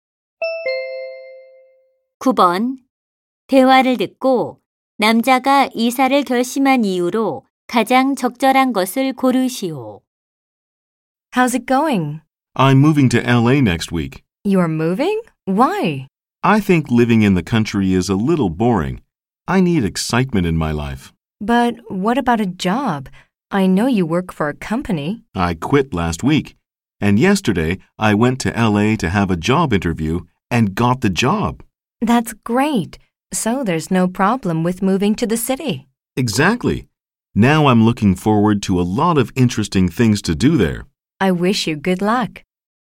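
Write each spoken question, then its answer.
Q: 대화를 듣고 남자가 이사를 결심한 이유로 가장 적절한 것을 고르시오.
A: 시골 생활이 지루해서 (도시의 흥미로운 생활을 원해서)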